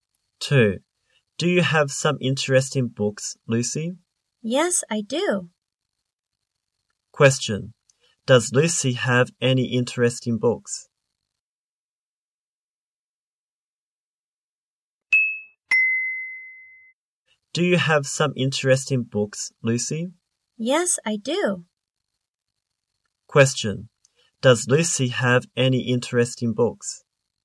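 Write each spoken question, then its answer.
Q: Does Lucy have any interesting books?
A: Yes, she does.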